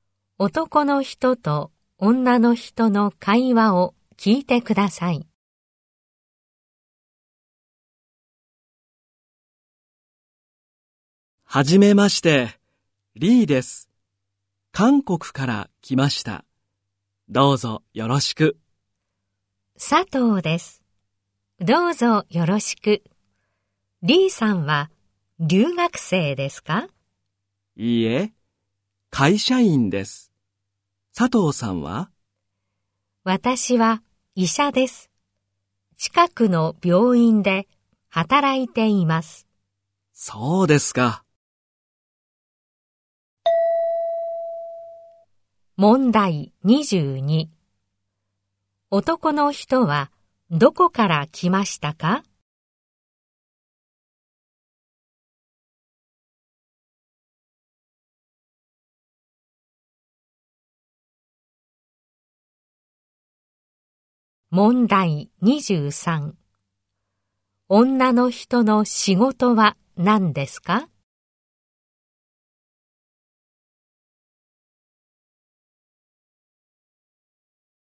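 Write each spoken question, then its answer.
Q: 男の人はどこから来ましたか?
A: 韓国

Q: 女の人の仕事は何ですか?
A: 医者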